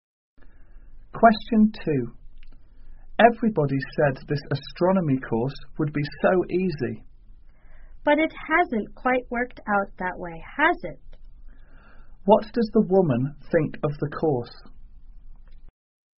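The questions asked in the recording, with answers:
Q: What does the woman think of the course?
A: It is harder than people said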